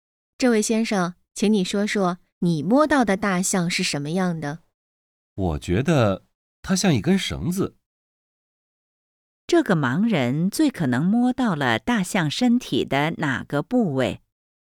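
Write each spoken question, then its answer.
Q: 这个盲人最可能摸到了大象身体的哪个部位?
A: 尾巴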